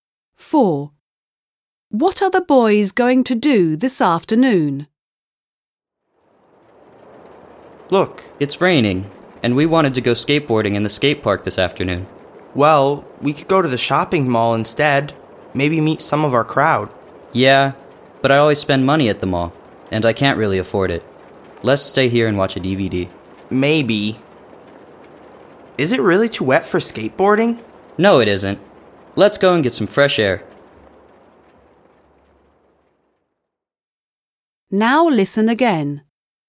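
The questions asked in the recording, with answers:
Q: What are the boys going to do this afternoon?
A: Go skateboarding in the skate park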